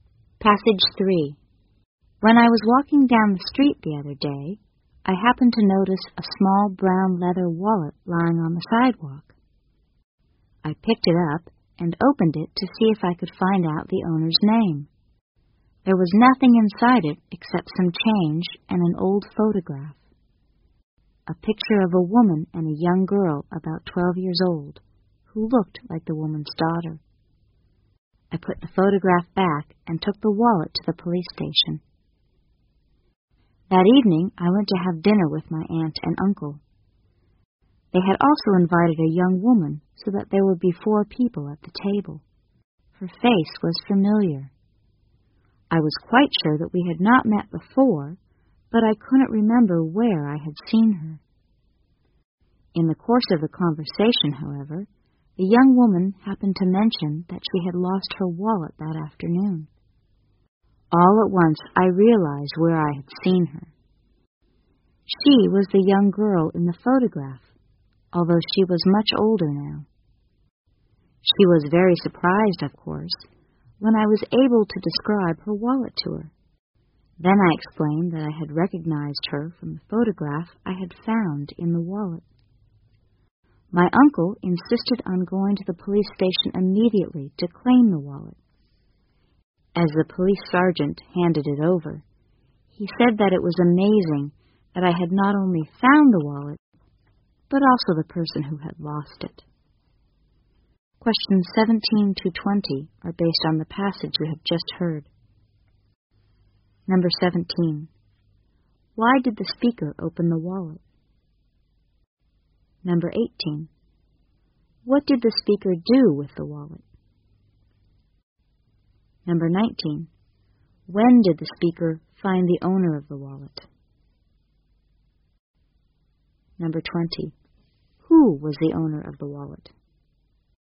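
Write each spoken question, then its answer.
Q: Why did the speaker open the wallet?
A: To find out the owner's name

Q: What did the speaker do with the wallet?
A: Took it to the police station

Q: When did the speaker find the owner of the wallet?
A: That evening at dinner with his aunt and uncle

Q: Who was the owner of the wallet?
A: The young woman invited to dinner, the girl in the photograph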